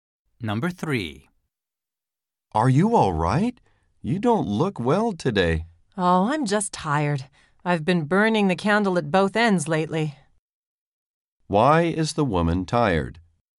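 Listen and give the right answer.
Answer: She has been overworking, burning the candle at both ends.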